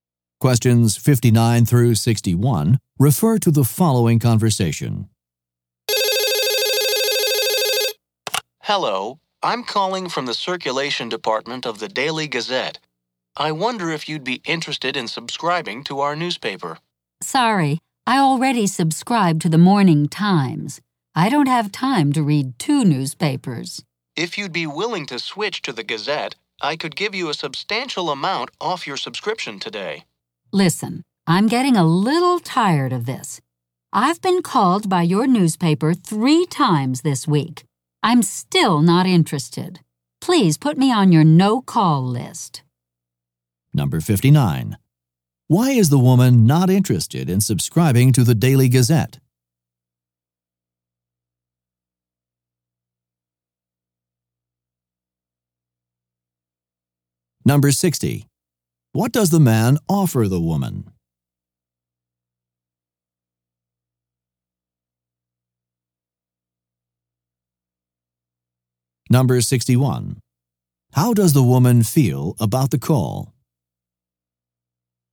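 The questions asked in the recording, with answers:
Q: Why is the woman not interested in subscribing to the Daily Gazette?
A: She already takes the Morning Times and has no time for two papers

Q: What does the man offer the woman?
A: A big discount on a subscription

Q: How does the woman feel about the call?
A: Annoyed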